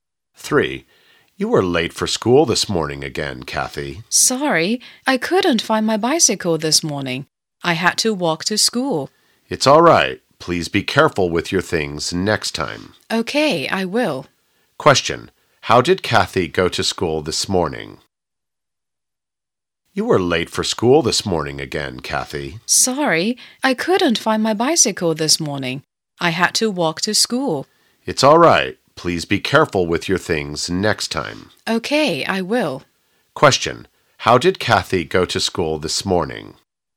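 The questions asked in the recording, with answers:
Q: Question,How did Kathy go to school this morning?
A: She walked to school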